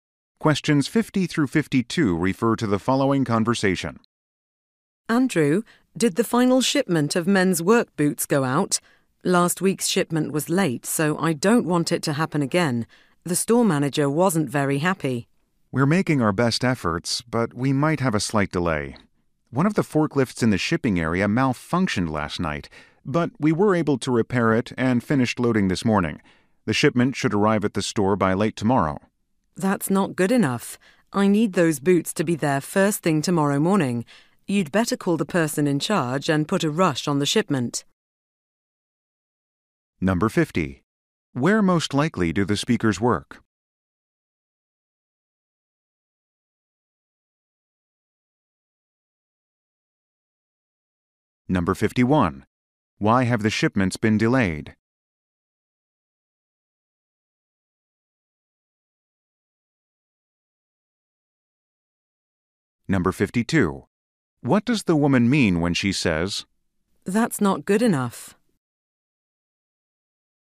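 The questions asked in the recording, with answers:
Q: Why have the shipments been delayed?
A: A forklift malfunctioned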